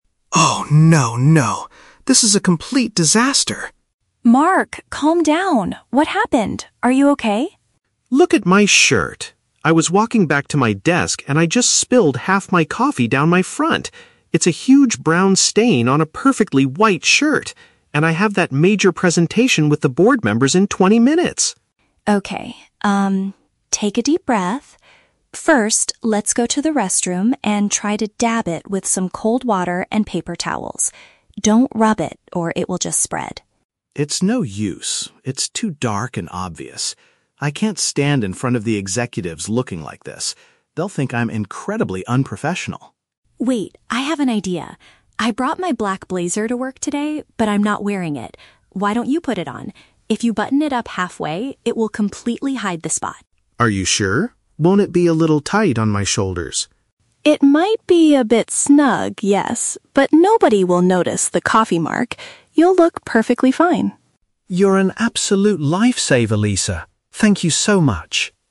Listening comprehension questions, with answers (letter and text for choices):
Listen to the conversation between two colleagues. For each question, choose the correct answer (A, B, or C).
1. Why is Mark panicking at the beginning of the conversation?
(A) He spilled a hot drink on his clothing.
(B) He lost the notes for his upcoming presentation.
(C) He dropped his coffee cup and broke it on the floor.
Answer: (A) He spilled a hot drink on his clothing.

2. What does Lisa suggest Mark do IMMEDIATELY after the accident?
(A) Ask to delay the meeting with the board members.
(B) Put her dark jacket on to hide the mess.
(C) Use cold water to gently clean the area.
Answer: (C) Use cold water to gently clean the area.

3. What is Mark's concern about wearing Lisa's clothing?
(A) He thinks the dark color looks very unprofessional.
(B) He worries that it might be slightly too small for him.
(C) He feels that it will make him too hot during his speech.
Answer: (B) He worries that it might be slightly too small for him.

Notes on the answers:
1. Mark says he "spilled half my coffee down my front" and it left a "brown stain on a perfectly white shirt." This is paraphrased as spilling a hot drink on his clothing. Option B is a trap; his "presentation" is mentioned, but he didn't lose his notes. Option C is a trap; he spilled the coffee on himself, not just dropped the cup on the floor.
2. Lisa's first piece of advice is to "dab it with some cold water and paper towels." Option B is a trap; putting on her dark jacket (blazer) is her second suggestion, only after Mark says the water won't work. Option A is plausible in real life but is never mentioned in the audio.
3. Mark asks, "Won't it be a little tight on my shoulders?" "Tight" is paraphrased as "too small for him." Option A is a trap; the word "unprofessional" is used by Mark, but he thinks his stained shirt looks unprofessional, not her black jacket. Option C is not mentioned in the conversation.

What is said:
Mark: Oh no, no, no! This is a complete disaster!
Lisa: Mark, calm down. What happened? Are you okay?
Mark: Look at my shirt! I was walking back to my desk and I just spilled half my coffee down my front. It's a huge brown stain on a perfectly white shirt. And I have that major presentation with the board members in twenty minutes!
Lisa: Okay, um, take a deep breath. First, let's go to the restroom and try to dab it with some cold water and paper towels. Don't rub it, or it will just spread.
Mark: It's no use. It's too dark and obvious. I can't stand in front of the executives looking like this. They'll think I'm incredibly unprofessional.
Lisa: Wait, I have an idea. I brought my black blazer to work today, but I'm not wearing it. Why don't you put it on? If you button it up halfway, it will completely hide the spot.
Mark: Are you sure? Won't it be a little tight on my shoulders?
Lisa: It might be a bit snug, yes, but nobody will notice the coffee mark. You'll look perfectly fine.
Mark: You're an absolute lifesaver, Lisa. Thank you so much!